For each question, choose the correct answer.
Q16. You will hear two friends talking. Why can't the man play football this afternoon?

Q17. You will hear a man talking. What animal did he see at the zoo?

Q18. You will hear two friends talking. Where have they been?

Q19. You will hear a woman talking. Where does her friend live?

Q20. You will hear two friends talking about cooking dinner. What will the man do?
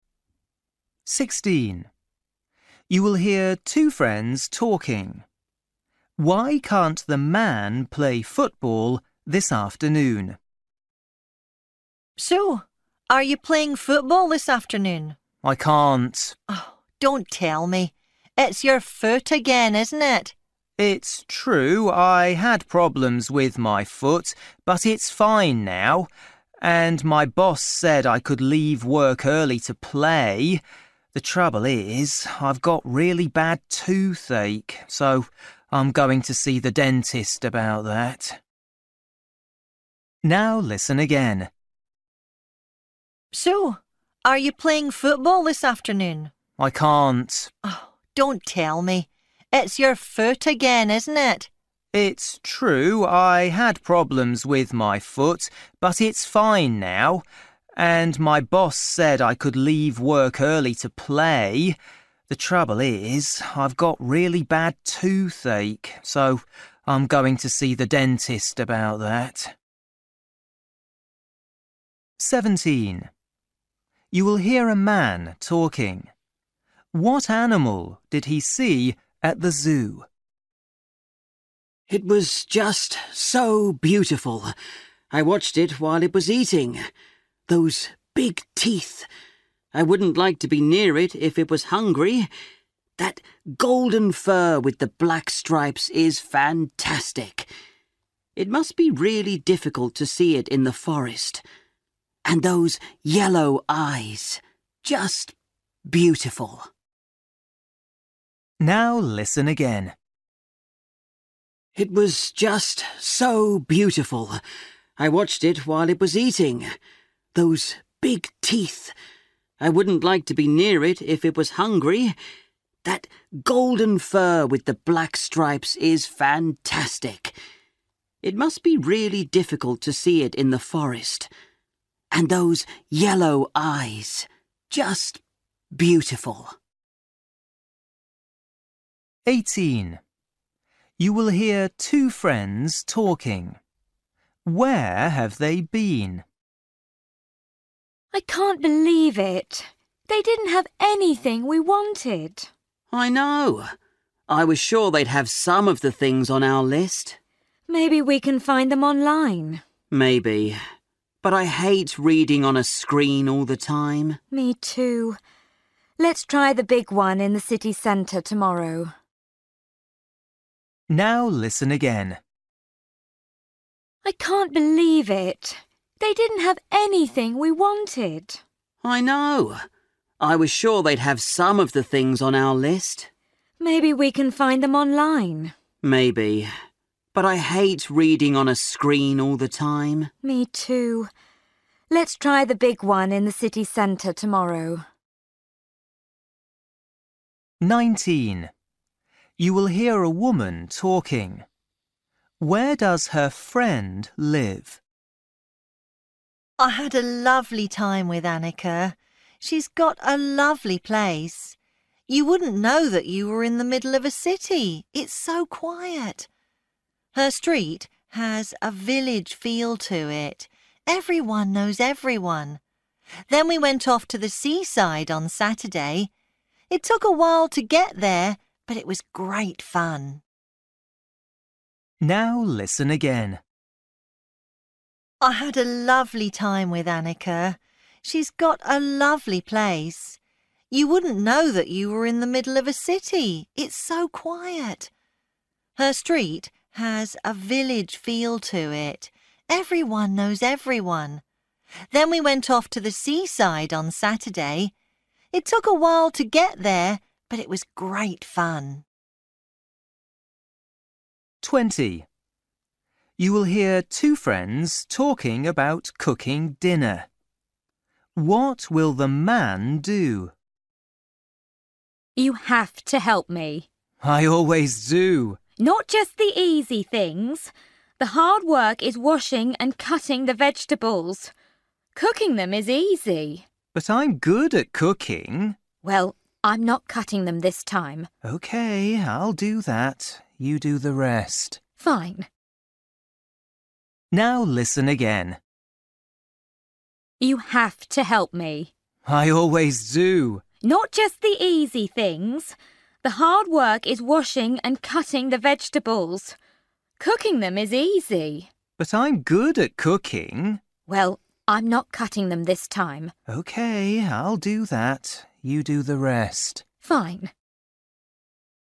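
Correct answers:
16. He has toothache and is going to the dentist.
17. A tiger
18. A bookshop
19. In a city
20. Wash and cut the vegetables

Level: Luyện nghe trình độ A2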